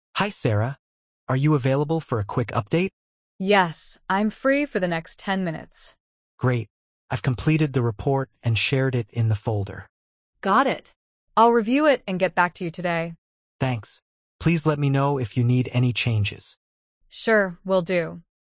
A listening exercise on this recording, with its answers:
Complete the phrases as you listen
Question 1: Hi Sara, are you available for a ______ update?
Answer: quick

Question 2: Yes, I'm free ______ the next 10 minutes.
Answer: for

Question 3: "I've completed the report and shared it ______ the folder."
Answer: in

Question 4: Got it. I'll review it and get ______ to you today.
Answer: back

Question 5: Please let me know if you need any ______.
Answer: changes

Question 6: Sure, ______ do.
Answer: will